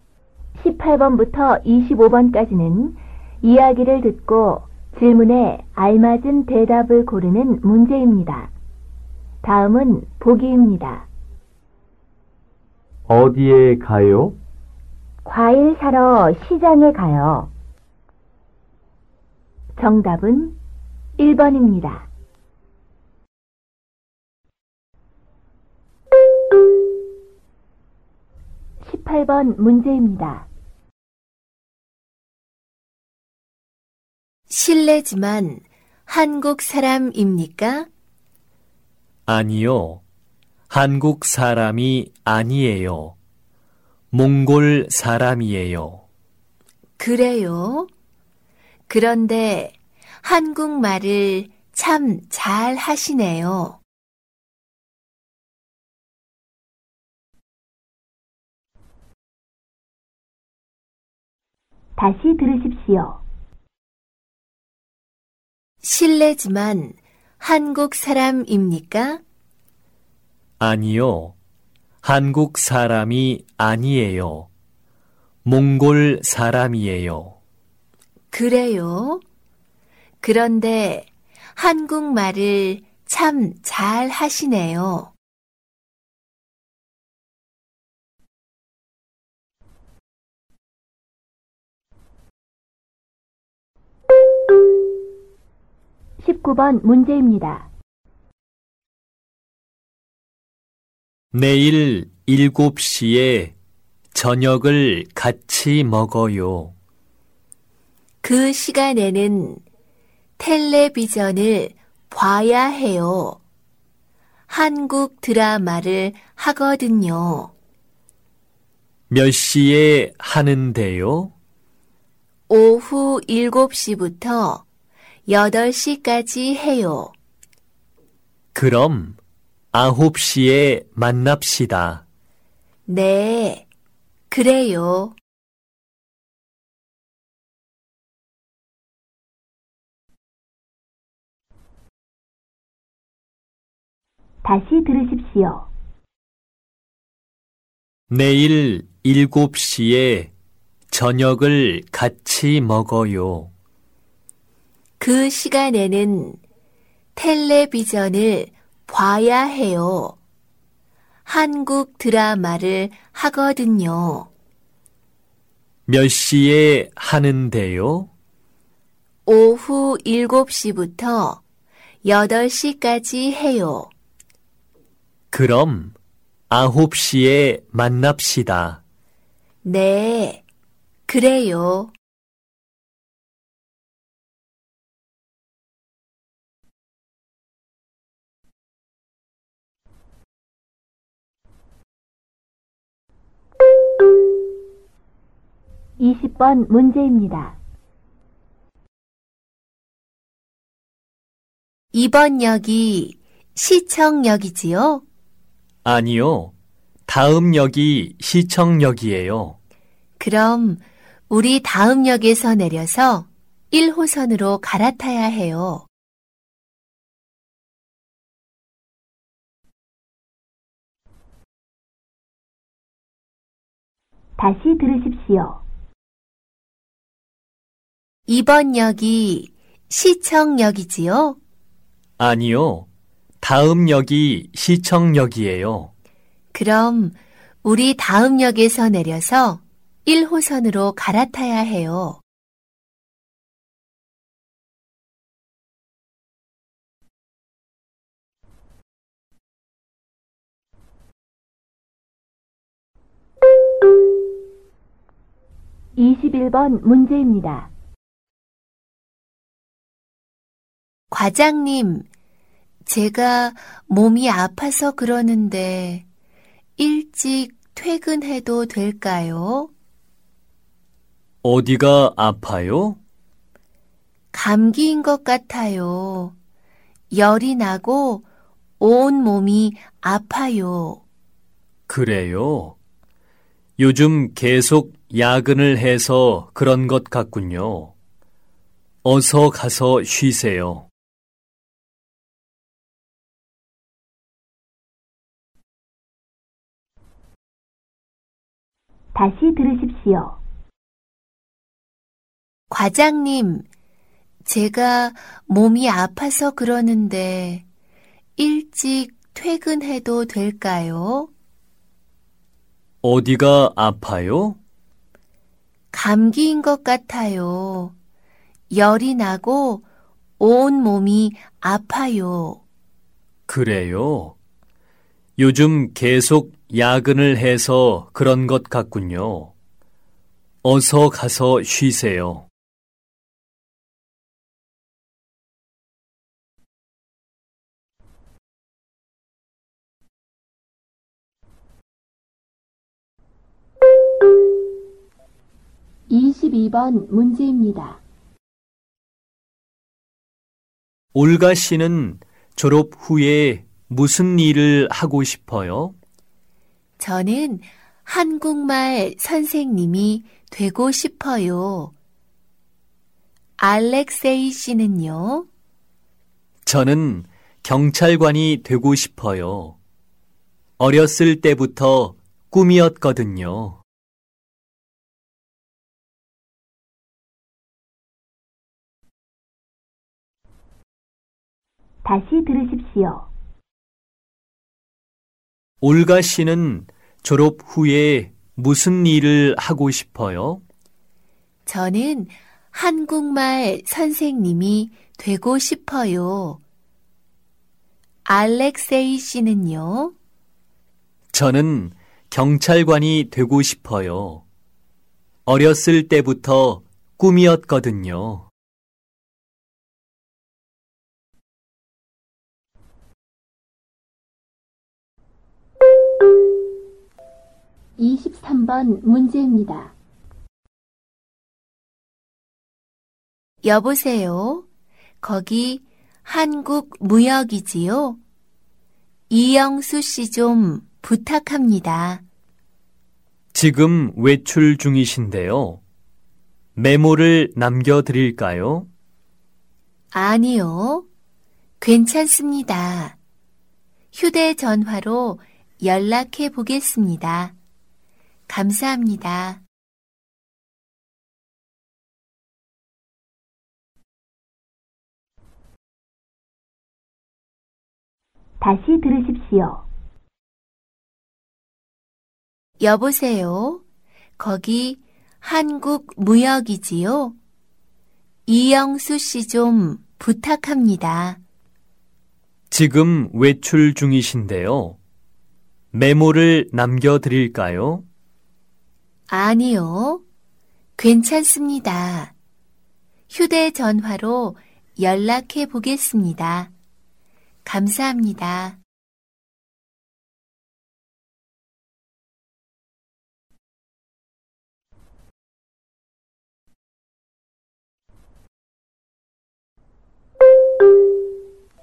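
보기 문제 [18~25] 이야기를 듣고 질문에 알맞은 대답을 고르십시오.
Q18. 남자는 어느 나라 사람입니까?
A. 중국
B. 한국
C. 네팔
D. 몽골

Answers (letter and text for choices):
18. D. 몽골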